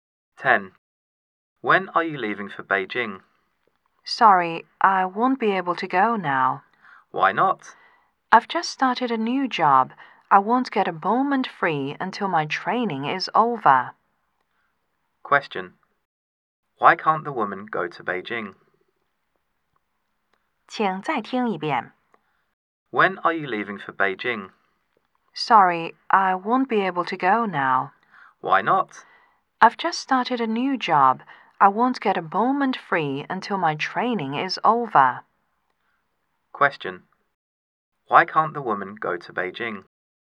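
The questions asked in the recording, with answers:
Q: Why can't the woman go to Beijing?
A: She has just started a new job and is in training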